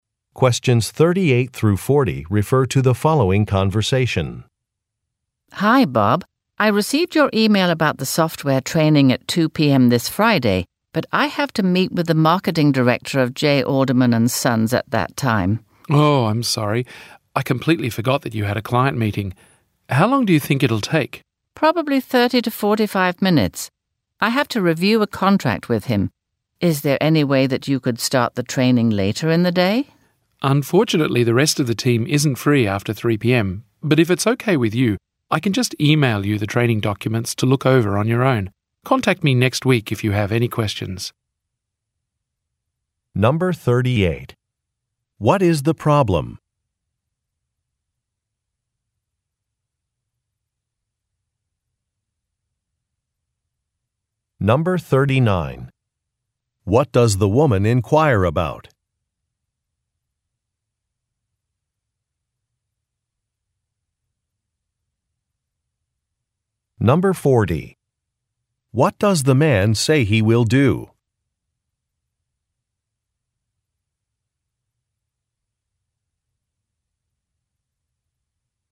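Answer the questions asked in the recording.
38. The woman has a client meeting at the same time as the software training.
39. Whether the training could start later in the day.
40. Email her the training documents.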